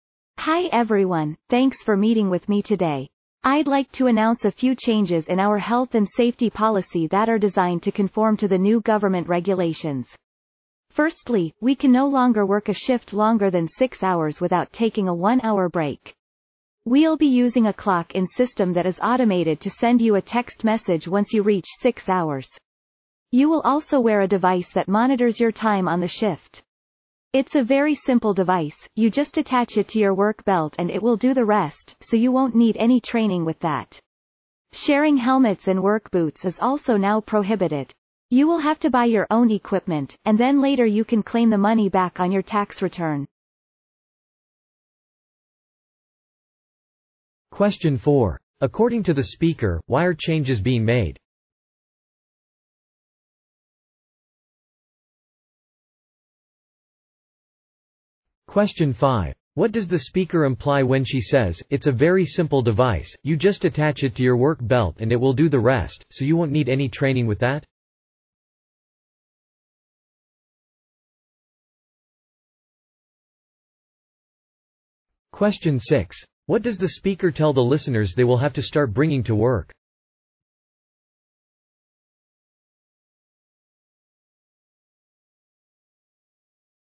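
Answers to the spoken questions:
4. To conform to new government regulations
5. The device is easy to use and needs no training
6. Their own helmets and work boots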